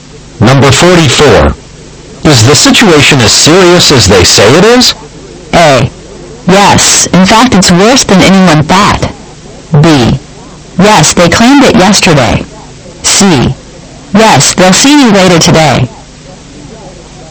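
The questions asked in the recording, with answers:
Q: Is the situation as serious as they say it is?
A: A: Yes. In fact, it's worse than anyone thought.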